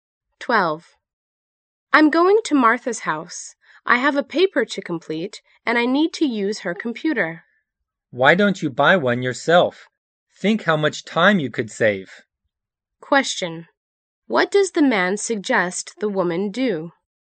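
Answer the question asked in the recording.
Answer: Buy her own computer.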